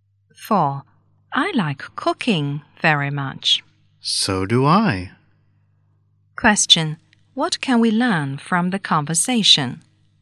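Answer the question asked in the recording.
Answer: Both speakers like cooking.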